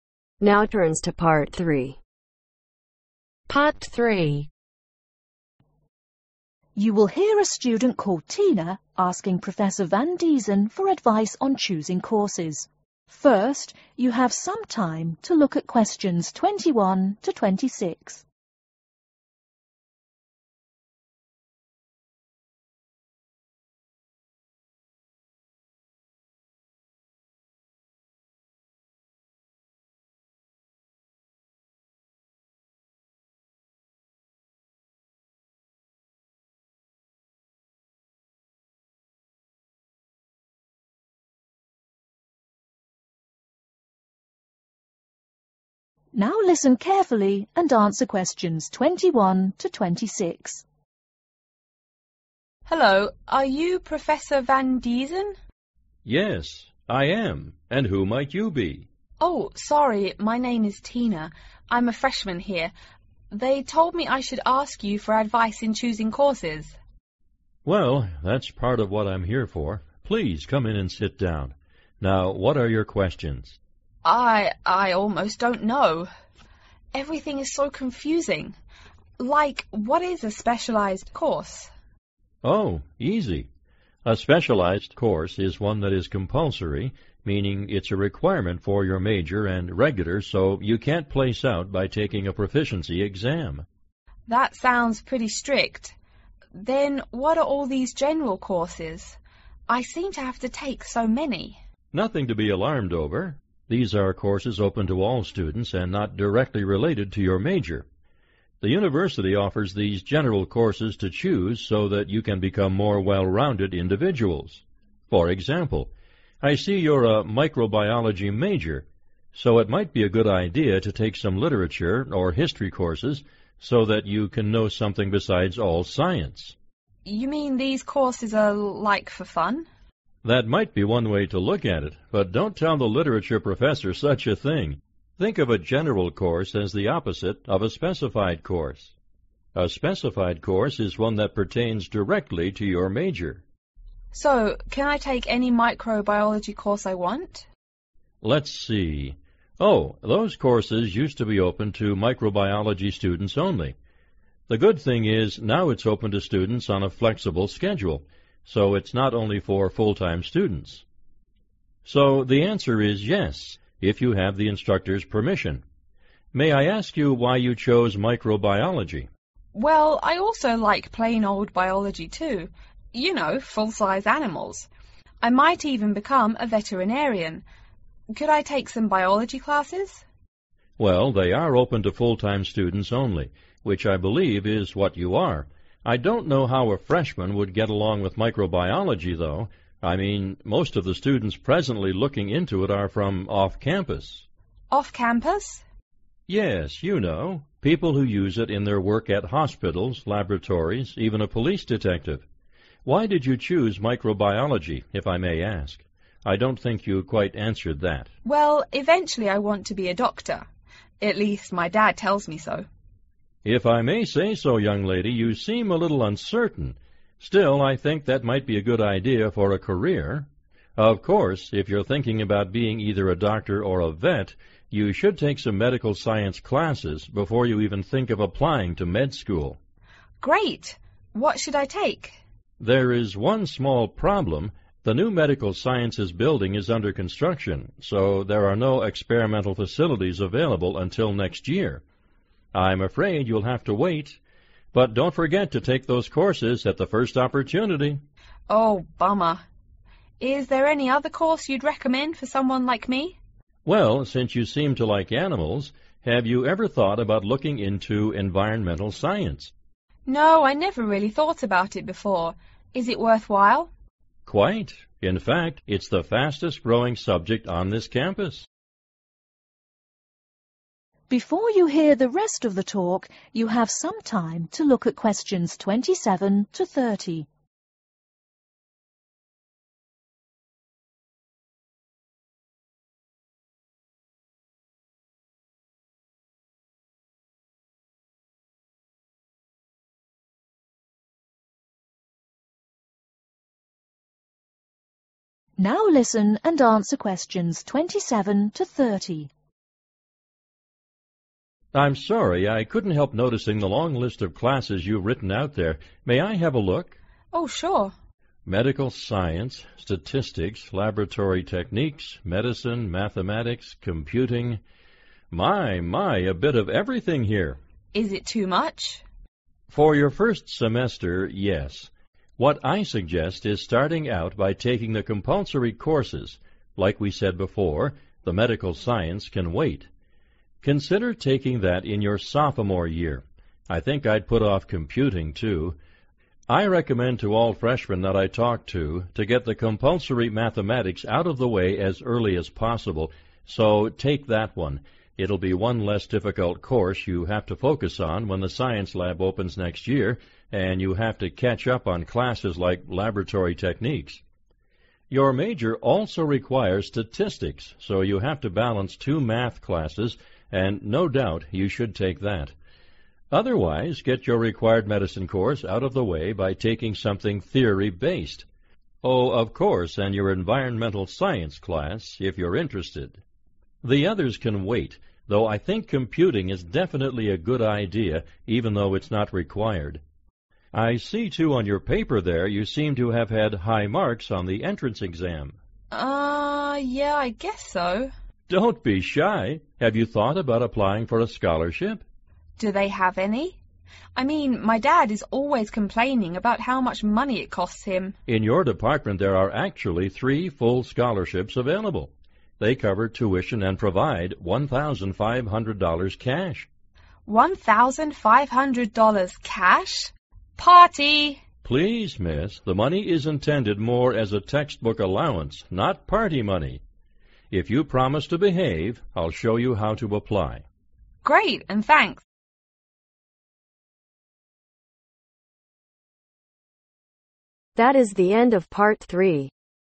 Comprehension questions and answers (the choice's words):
Circle the correct letter.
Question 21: What is the defining characteristic of a specialized course ?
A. Taking a proficiency exam.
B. Attending the class frequently.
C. Compulsory and regular.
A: Compulsory and regular.

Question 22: The microbiology courses are available for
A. full-time and flexible-time students.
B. Microbiology students only.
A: full-time and flexible-time students.

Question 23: The Biology courses are available for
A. all students.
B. full-time students only.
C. freshmen only.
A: full-time students only.

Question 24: Who are interested in Microbiology courses ?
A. People who need work experience.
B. People from off campus.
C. People who work at hospital.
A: People from off campus.

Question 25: A Medical science course will be opened next year because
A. there are no experimental facilities.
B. the lab equipment is too expensive.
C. the building is damaged.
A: there are no experimental facilities.

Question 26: Which is quickest increasing subject in enrolment ?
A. Media Science.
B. Statistics.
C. Environment Science.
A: Environment Science.

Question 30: There are three full scholarships that cover tuition and provide $1,500 cash as a ............ .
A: Textbook allowance